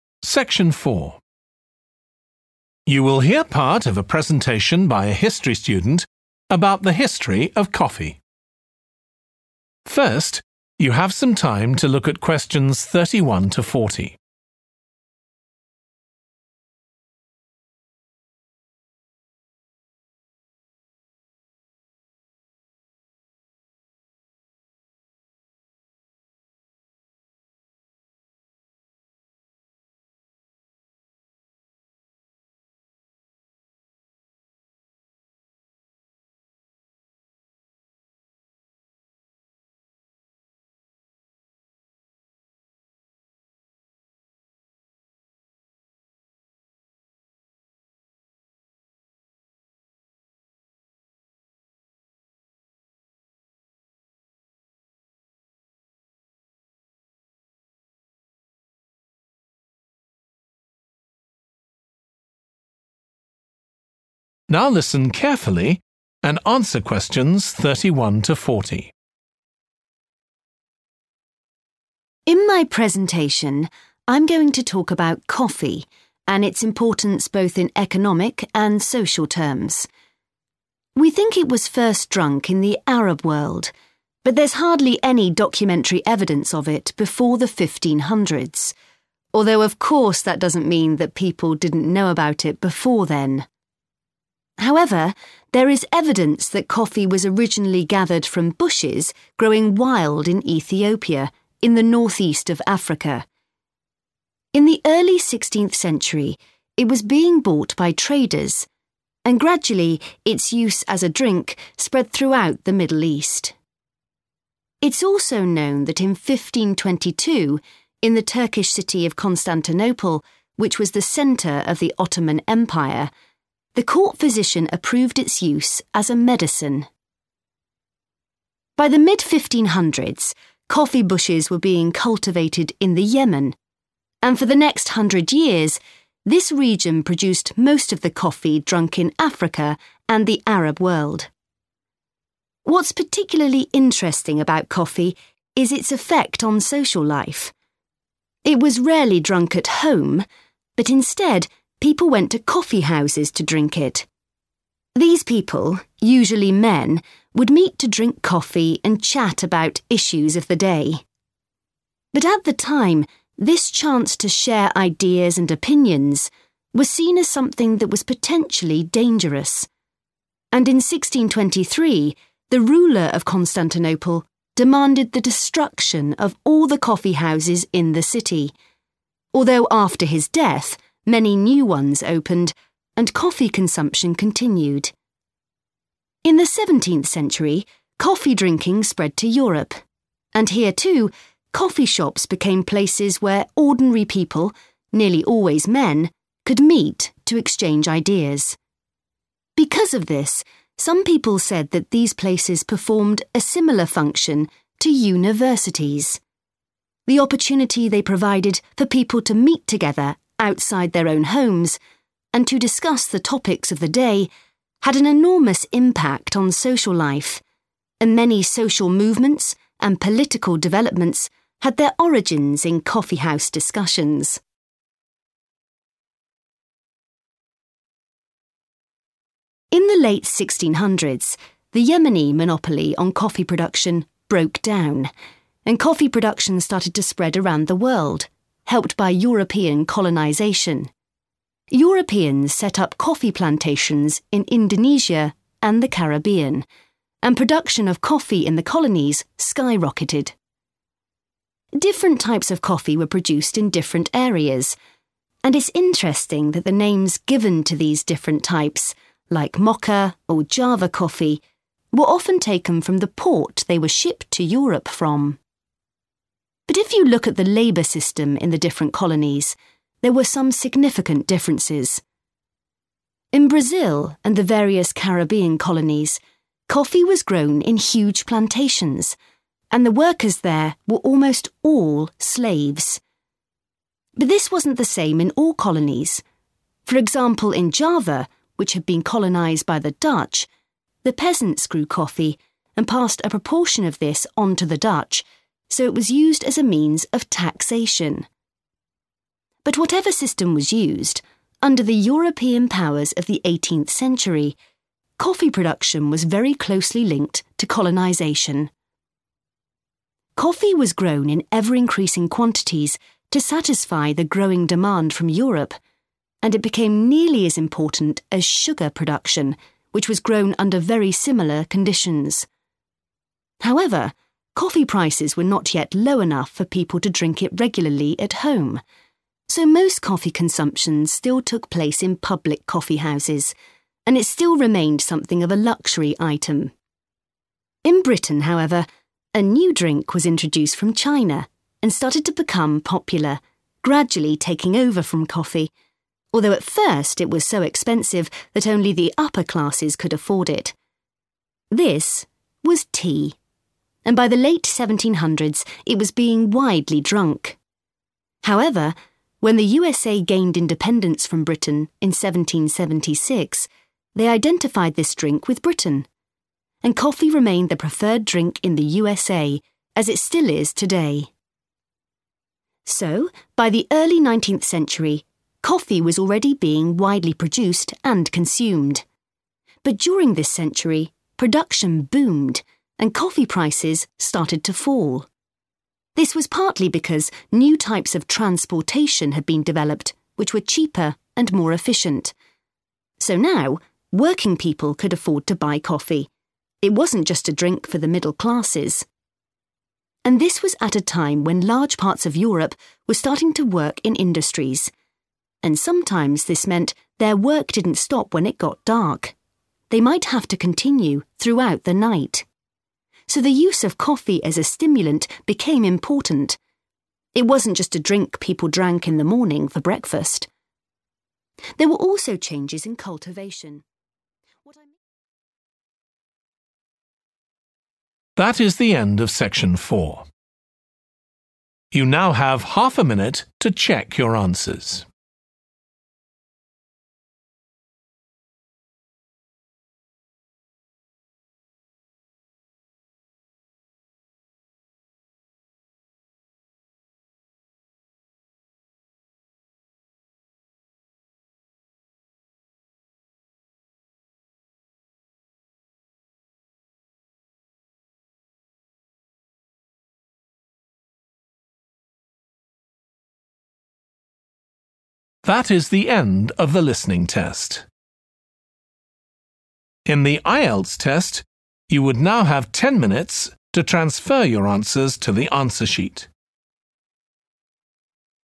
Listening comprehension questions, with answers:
Complete the notes below. Write ONE WORD ONLY for each answer.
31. 1623: In Constantinople, the ruler ordered the _____ of every coffee house.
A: destruction

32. Coffee shops were compared to _____ .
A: universities / university

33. They played an important part in social and _____ changes.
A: political

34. Types of coffee were often named according to the _____ they came from.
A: port / ports

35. In Brazil and the Caribbean, most cultivation depended on _____ .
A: slaves / slavery

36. In Java, coffee was used as a form of _____ .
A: taxation

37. Coffee became almost as important as _____ .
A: sugar

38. The move towards the consumption of _____ in Britain did not also take place in the USA.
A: tea

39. Prices dropped because of improvements in _____ .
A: transportation

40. Industrial workers found coffee helped them to work at _____ .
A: night

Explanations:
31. The correct answer is 'destruction' because the ruler ordered the destruction of all the coffee houses, which means he wanted them to be completely removed or eliminated from the city.
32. The correct answer is supported by the fact that the transcript directly compares coffee shops to universities, emphasizing their role as places for sharing ideas and knowledge akin to universities, where education and intellectual discussions take place.
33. The correct answer fits because it aligns with the idea that coffee houses were places where discussions led to political developments, as indicated in the excerpt about social movements originating from coffee house talks.
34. The correct answer is 'port' or 'ports' because the excerpt explains that the names of coffee types were often taken from the port they were shipped to Europe from.
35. The correct answer is 'slaves' because the excerpt clearly states that the workers on coffee plantations in Brazil and the Caribbean were mostly slaves, implying they were forced to work involuntarily, often under oppressive conditions.
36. The correct answer is 'taxation' because it matches the situation described in the excerpt, where the peasants in Java grew coffee and gave some of it to the Dutch as a kind of payment or obligation. This is a form of taxation, where the ruler or government takes a portion of the goods or money from the people.
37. The correct answer is 'sugar' because the excerpt says 'it became nearly as important as sugar production', which means that 'sugar' is the correct word to fill in the blank in the original text.
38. The correct answer is 'tea' because the excerpt clearly states that the drink that was associated with Britain (and, as a result, not favored in the USA) was tea. This supports the idea that coffee remained the preferred drink in the USA during that period.
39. The correct answer is 'transportation' because the excerpt explains that improvements in transportation helped lower prices, making moving coffee easier and more affordable.
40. The correct answer 'night' is appropriate because it directly corresponds to the situation described in the excerpt where workers continued their work throughout the night, indicating they worked after the sun had set.

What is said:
In my presentation, I'm going to talk about coffee, and its importance both in economic and social terms. We think it was first drunk in the Arab world, but there's hardly any documentary evidence of it before the 1500s, although of course that doesn't mean that people didn't know about it before then.
However, there is evidence that coffee was originally gathered from bushes growing wild in Ethiopia, in the northeast of Africa. In the early sixteenth century, it was being bought by traders, and gradually its use as a drink spread throughout the Middle East. It's also known that in 1522, in the Turkish city of Constantinople, which was the centre of the Ottoman Empire, the court physician approved its use as a medicine.
By the mid-1500s, coffee bushes were being cultivated in the Yemen and for the next hundred years this region produced most of the coffee drunk in Africa and the Arab world. What's particularly interesting about coffee is its effect on social life. It was rarely drunk at home, but instead people went to coffee houses to drink it. These people, usually men, would meet to drink coffee and chat about issues of the day. But at the time, this chance to share ideas and opinions was seen as something that was potentially dangerous, and in 1623 the ruler of Constantinople demanded the destruction of all the coffee houses in the city, although after his death many new ones opened, and coffee consumption continued. In the seventeenth century, coffee drinking spread to Europe, and here too coffee shops became places where ordinary people, nearly always men, could meet to exchange ideas. Because of this, some people said that these places performed a similar function to universities. The opportunity they provided for people to meet together outside their own homes and to discuss the topics of the day had an enormous impact on social life, and many social movements and political developments had their origins in coffee house discussions.
In the late 1600s, the Yemeni monopoly on coffee production broke down and coffee production started to spread around the world, helped by European colonization. Europeans set up coffee plantations in Indonesia and the Caribbean and production of coffee in the colonies skyrocketed. Different types of coffee were produced in different areas, and it's interesting that the names given to these different types, like Mocha or Java coffee, were often taken from the port they were shipped to Europe from. But if you look at the labour system in the different colonies, there were some significant differences.
In Brazil and the various Caribbean colonies, coffee was grown in huge plantations and the workers there were almost all slaves. But this wasn't the same in all colonies; for example in Java, which had been colonized by the Dutch, the peasants grew coffee and passed a proportion of this on to the Dutch, so it was used as a means of taxation. But whatever system was used, under the European powers of the eighteenth century, coffee production was very closely linked to colonisation. Coffee was grown in ever-increasing quantities to satisfy the growing demand from Europe, and it became nearly as important as sugar production, which was grown under very similar conditions. However, coffee prices were not yet low enough for people to drink it regularly at home, so most coffee consumption still took place in public coffee houses and it still remained something of a luxury item. In Britain, however, a new drink was introduced from China, and started to become popular, gradually taking over from coffee, although at first it was so expensive that only the upper classes could afford it. This was tea, and by the late 1700s it was being widely drunk. However, when the USA gained independence from Britain in 1766, they identified this drink with Britain, and coffee remained the preferred drink in the USA, as it still is today.
So, by the early nineteenth century, coffee was already being widely produced and consumed. But during this century, production boomed and coffee prices started to fall. This was partly because new types of transportation had been developed which were cheaper and more efficient. So now, working people could afford to buy coffee – it wasn't just a drink for the middle classes. And this was at a time when large parts of Europe were starting to work in industries. And sometimes this meant their work didn't stop when it got dark; they might have to continue throughout the night. So, the use of coffee as a stimulant became important – it wasn't just a drink people drank in the morning, for breakfast.
There were also changes in cultivation ...